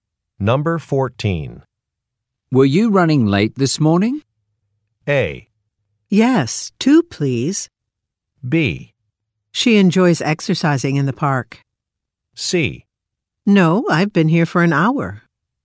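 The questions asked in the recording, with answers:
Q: Were you running late this morning?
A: C: No, I've been here for an hour.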